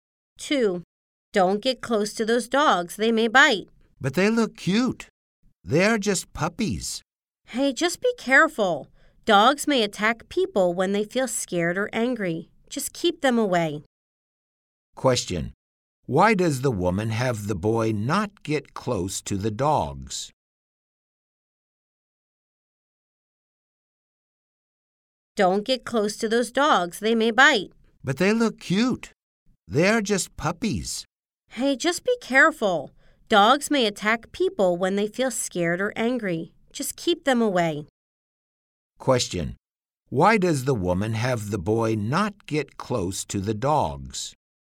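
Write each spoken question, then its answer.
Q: Why does the woman have the boy not get close to the dogs?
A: Because they may bite.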